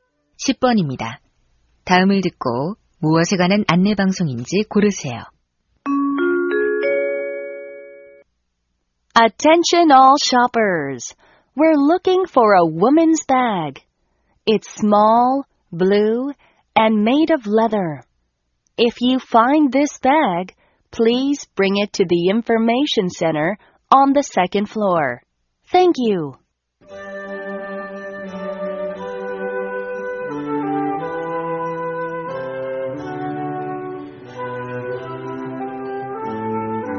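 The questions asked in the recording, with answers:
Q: 다음을 듣고 무엇에 관한 안내 방송인지 고르세요.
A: 분실된 가방 찾기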